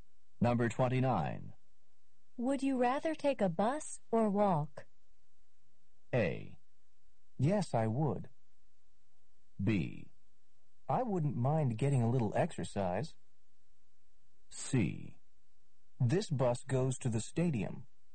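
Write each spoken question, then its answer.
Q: Would you rather take a bus or walk?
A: B: I wouldn't mind getting a little exercise.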